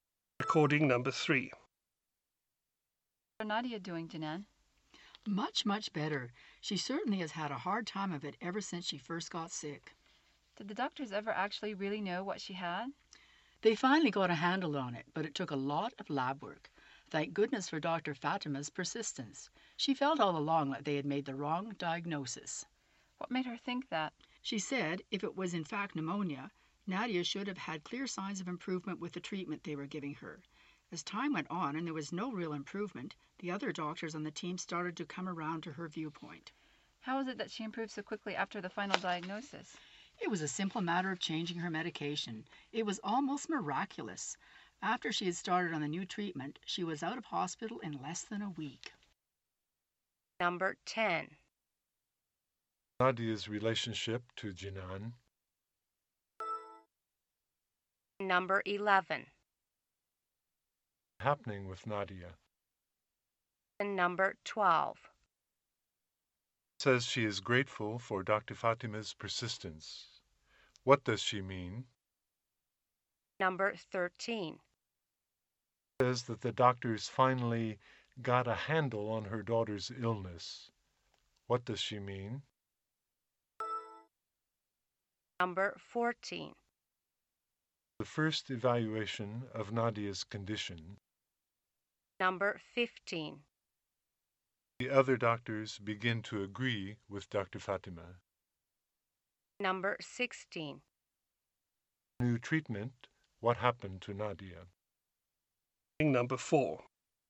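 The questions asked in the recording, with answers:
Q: Says she is grateful for Dr.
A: Dr. Fatima kept insisting the diagnosis was wrong

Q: Says that the doctors finally got a handle on her daughter's illness.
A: They finally figured out what the illness was

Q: The first evaluation of Nadia's condition.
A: Pneumonia

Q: The other doctors begin to agree with Dr.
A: When Nadia showed no real improvement with the treatment

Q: New treatment. What happened to Nadia?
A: She was out of hospital in less than a week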